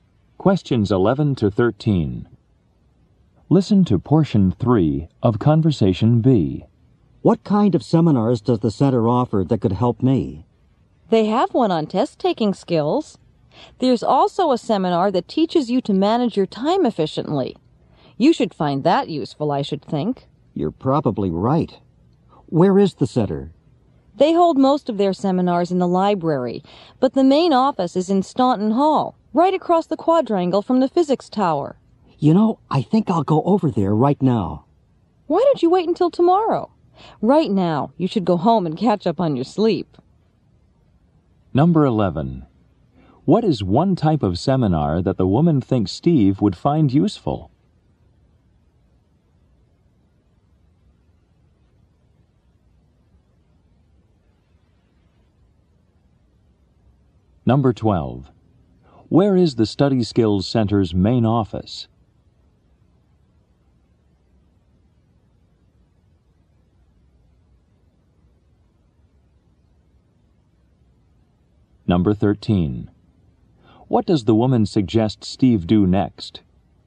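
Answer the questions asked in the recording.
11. Time management (managing time efficiently)
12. In Staunton Hall, across the quadrangle from the physics tower
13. Go home and catch up on his sleep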